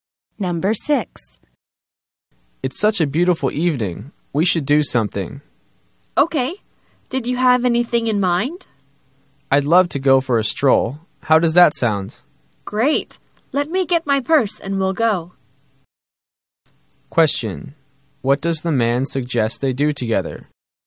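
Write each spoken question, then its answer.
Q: What does the man suggest they do together?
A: Go for a stroll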